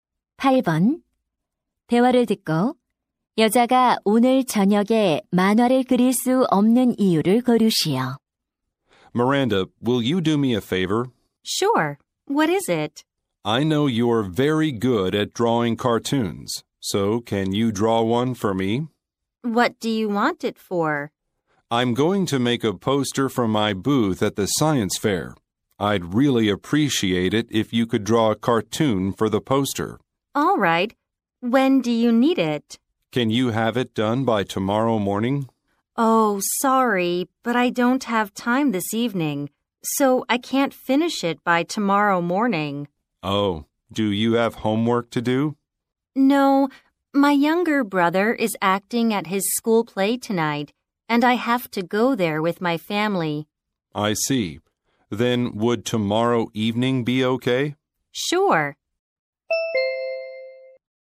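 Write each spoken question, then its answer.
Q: 대화를 듣고 여자가 오늘 저녁에 만화를 그릴 수 없는 이유를 고르시오.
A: 남동생의 학교 연극을 보러 가야 해서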